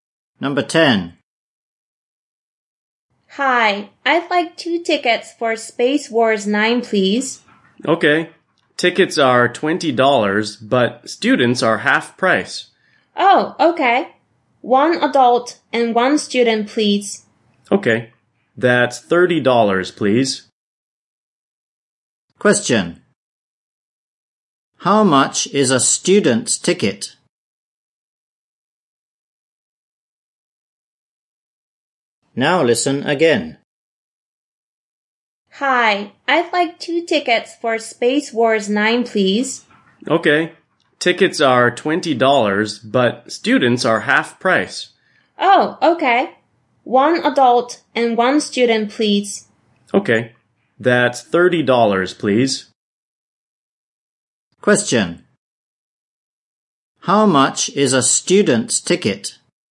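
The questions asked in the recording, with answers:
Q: How much is a student's ticket?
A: $10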